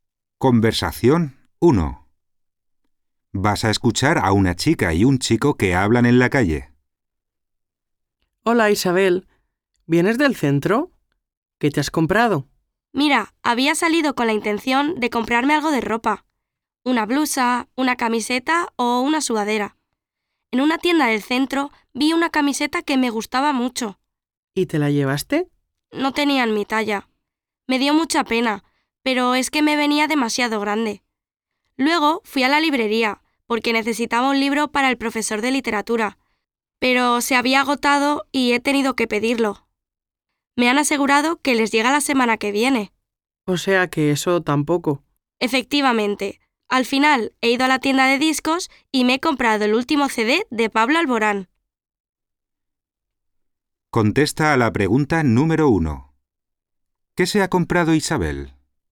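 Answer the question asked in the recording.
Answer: El último CD de Pablo Alborán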